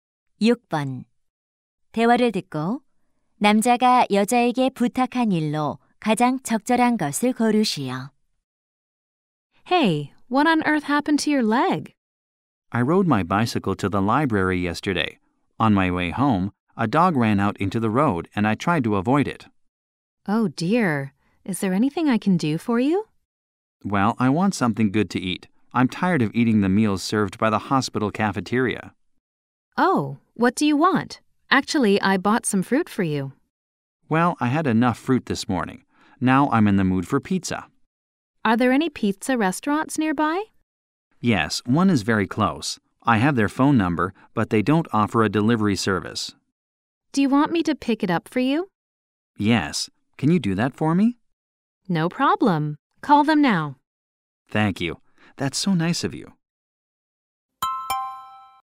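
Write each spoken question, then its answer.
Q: 대화를 듣고 남자가 여자에게 부탁한 일로 가장 적절한 것을 고르시오.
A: 피자 가져다 주기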